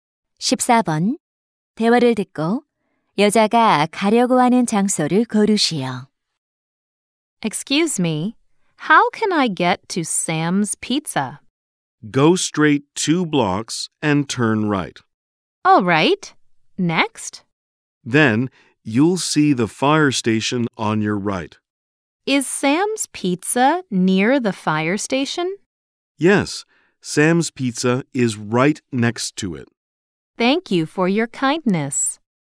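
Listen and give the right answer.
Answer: Sam's Pizza (피자 가게)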